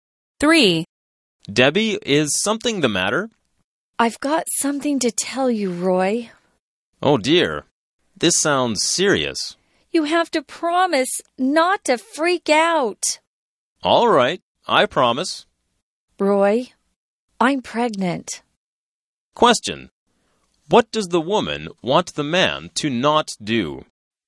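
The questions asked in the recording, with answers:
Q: What does the woman want the man to not do?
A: Freak out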